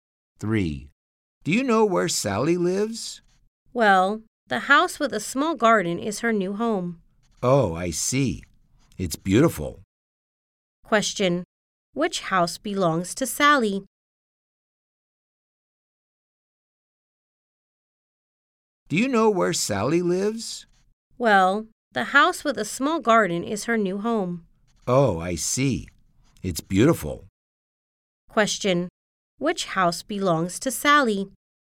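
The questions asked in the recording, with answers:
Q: Which house belongs to Sally?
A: The house with a small garden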